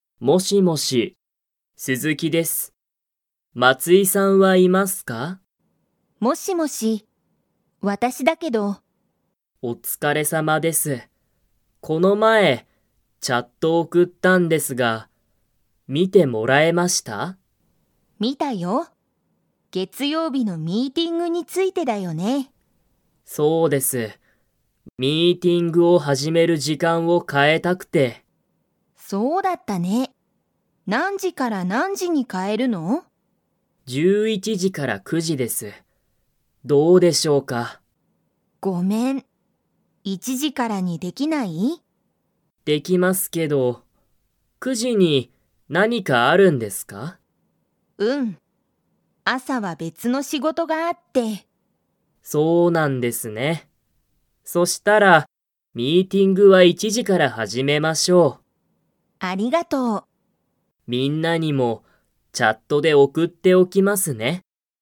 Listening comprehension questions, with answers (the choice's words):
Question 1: そのチャットは、____についてだ。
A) 別べつの仕事しごと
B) 月曜日げつようびのミーティング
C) この前まえの仕事しごと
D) 毎日まいにちのミーティング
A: 月曜日げつようびのミーティング

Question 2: 9時くじにミーティングを始はじめますか?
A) はい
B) いいえ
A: いいえ

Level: Level 2